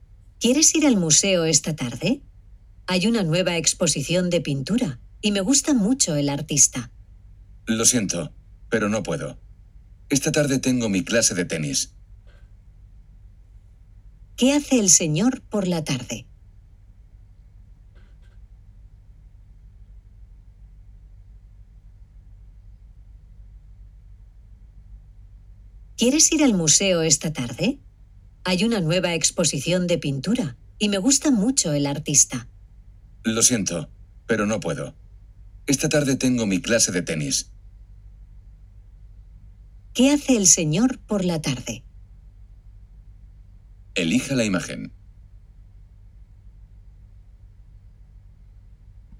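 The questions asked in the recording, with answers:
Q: ¿Qué hace el señor por la tarde?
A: Tiene clase de tenis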